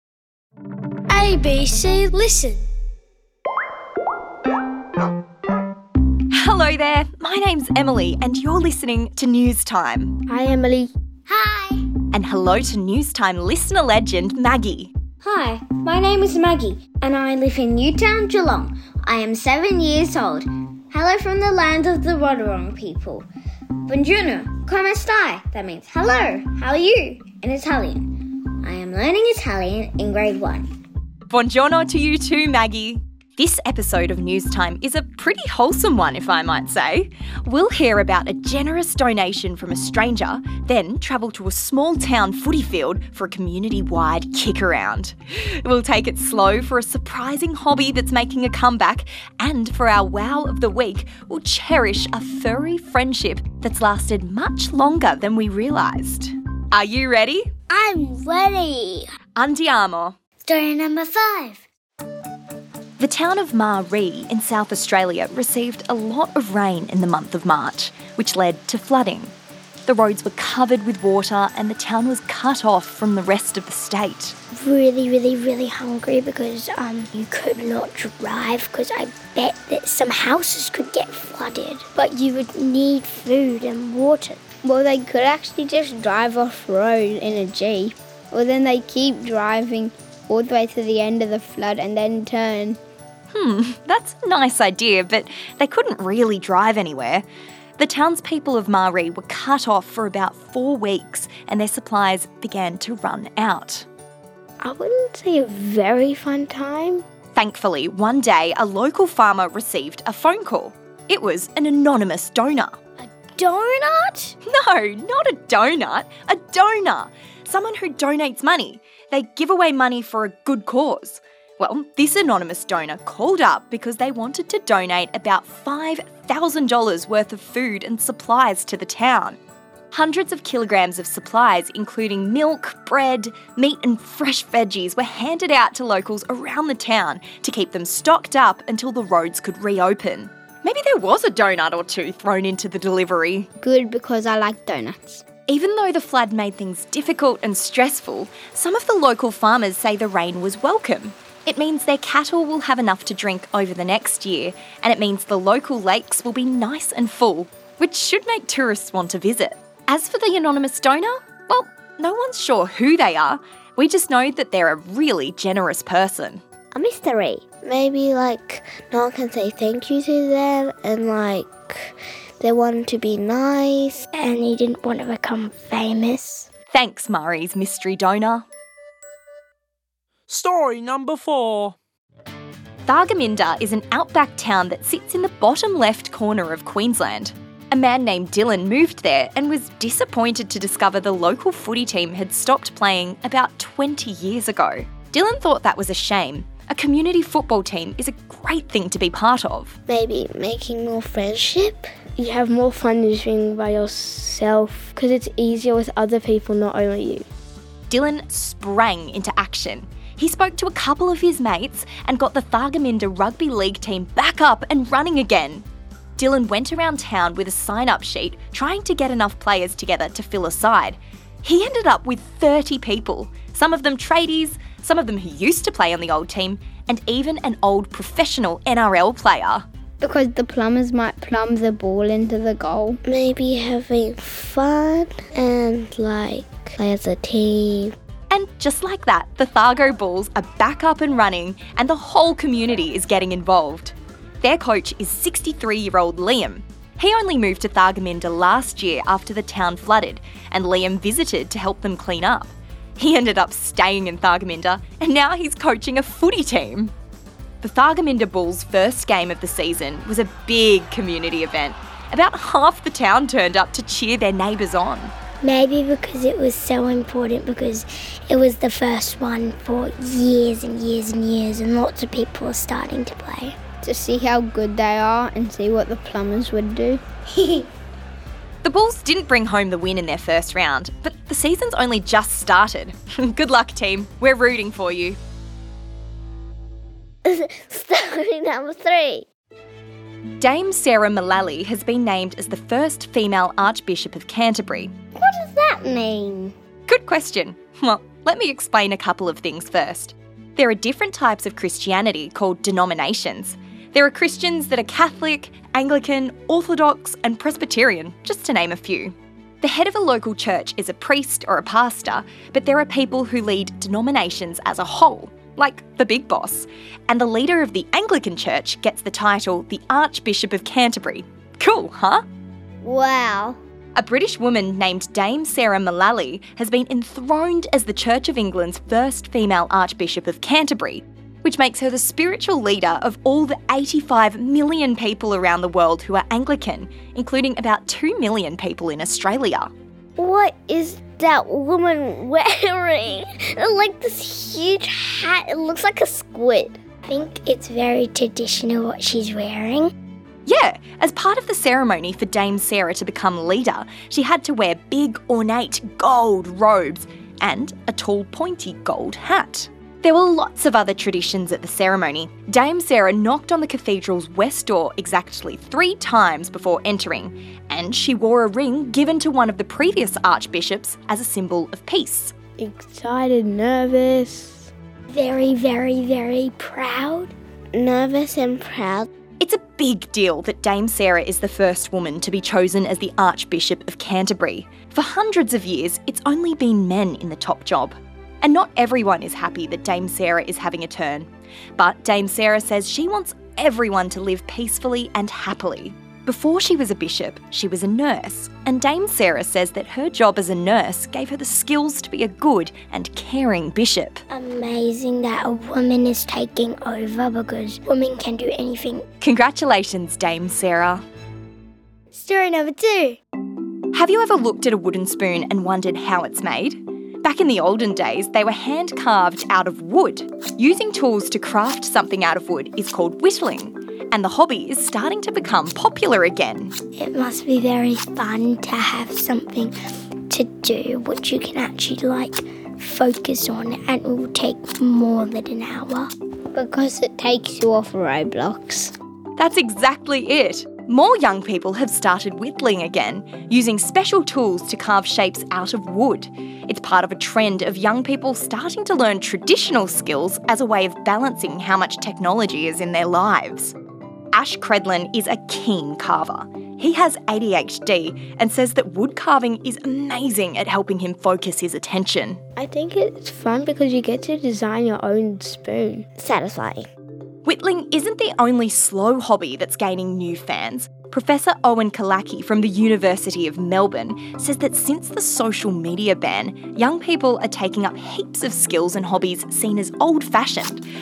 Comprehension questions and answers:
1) Who donated all the food to the flooded town?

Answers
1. We don't know! They chose to stay anonymous.